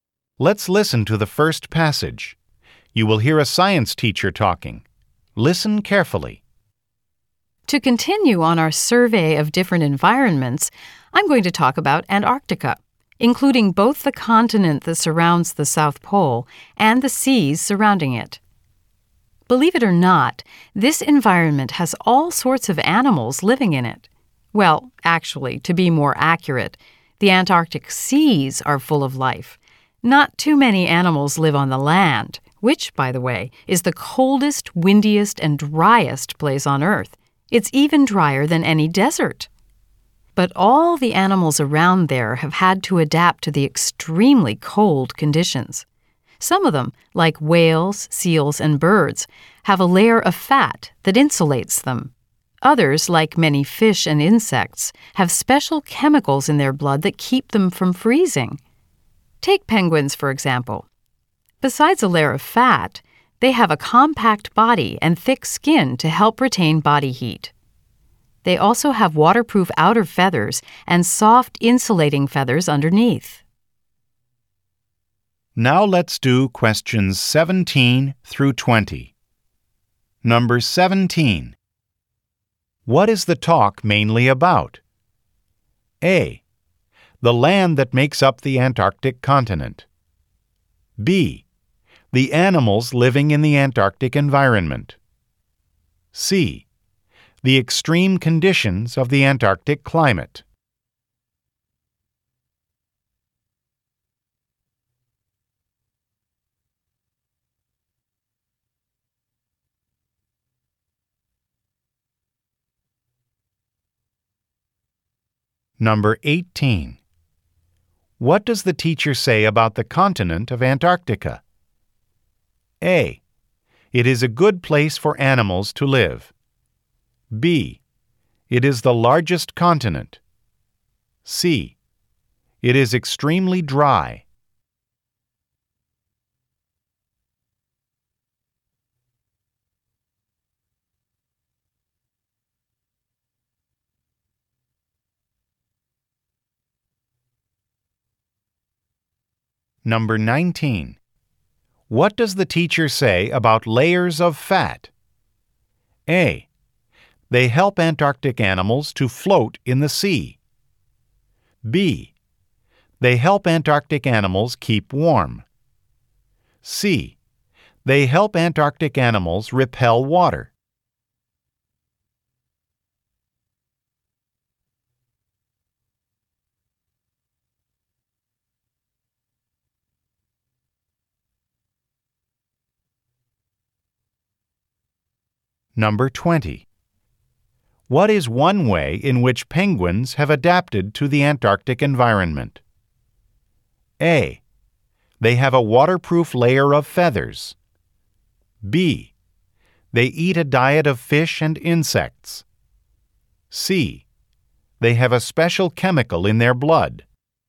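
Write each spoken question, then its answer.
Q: What is the talk mainly about?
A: B: The animals living in the Antarctic environment.

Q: What does the teacher say about the continent of Antarctica?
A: C: It is extremely dry.

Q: What does the teacher say about layers of fat?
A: B: They help Antarctic animals keep warm.

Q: What is one way in which penguins have adapted to the Antarctic environment?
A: A: They have a waterproof layer of feathers.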